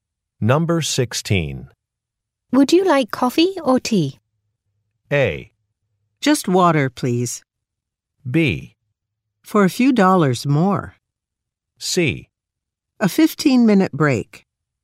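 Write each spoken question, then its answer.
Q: Would you like coffee or tea?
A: A: Just water, please.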